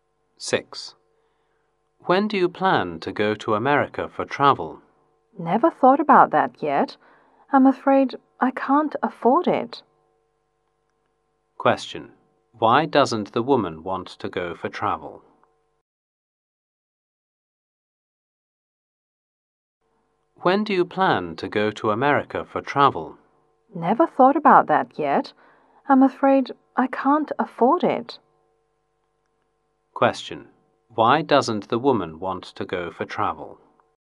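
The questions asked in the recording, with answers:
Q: Why doesn't the woman want to go for travel?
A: She can't afford it.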